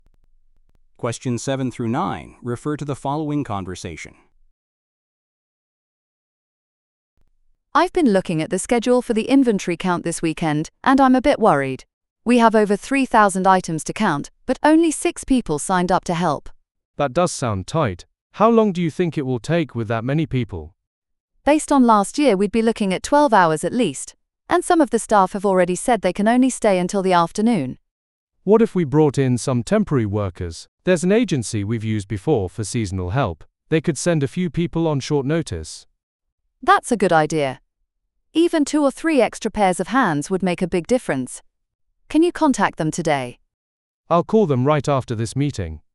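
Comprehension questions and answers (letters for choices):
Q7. What is happening this weekend?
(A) An inventory count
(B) A store opening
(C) A product launch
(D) A staff training session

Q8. What is the woman concerned about?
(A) The time required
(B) The number of workers available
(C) The accuracy of the records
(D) The condition of the equipment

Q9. What solution does the man propose?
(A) Working overtime themselves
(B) Postponing the count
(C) Reducing the item list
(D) Hiring temporary staff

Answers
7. A
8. B
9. D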